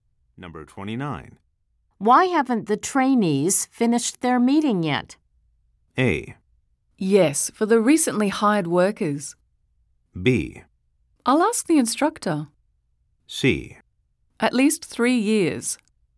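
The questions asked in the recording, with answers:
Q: Why haven't the trainees finished their meeting yet?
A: B: I'll ask the instructor.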